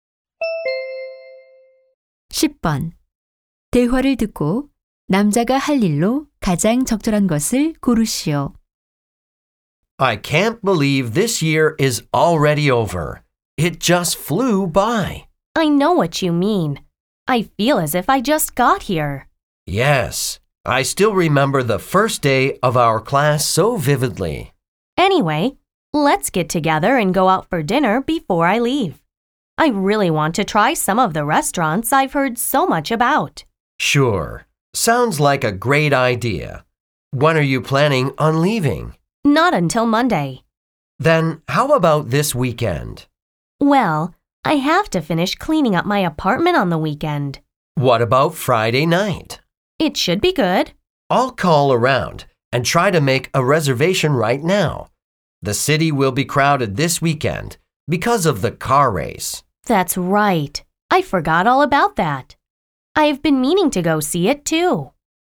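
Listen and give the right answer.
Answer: 식당 예약 전화하기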